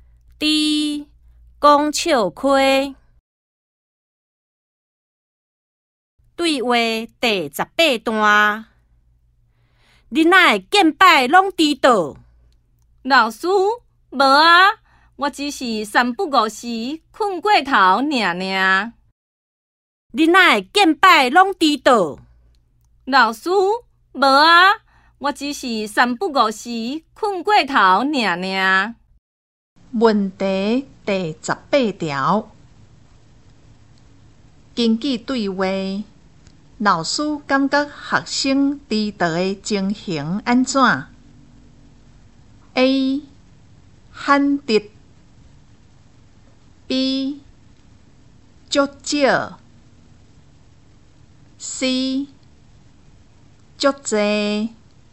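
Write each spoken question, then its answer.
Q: 根据对话,老师感觉学生迟到的情形安怎 ?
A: C: 足多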